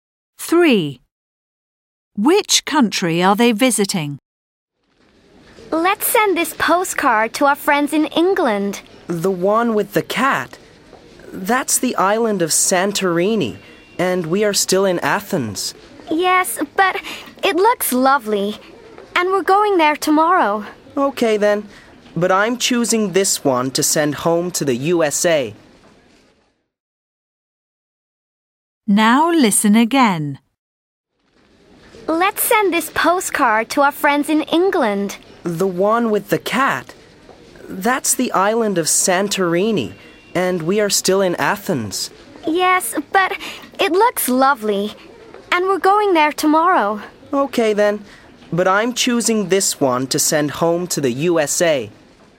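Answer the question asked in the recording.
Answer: Greece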